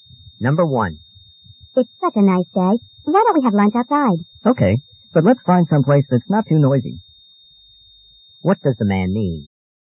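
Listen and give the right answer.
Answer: He agrees to eat outside, but somewhere quiet.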